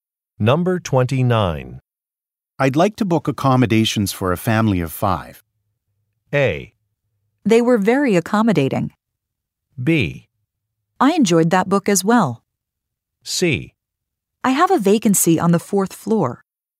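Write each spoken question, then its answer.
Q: I'd like to book accommodations for a family of five.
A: C: I have a vacancy on the fourth floor.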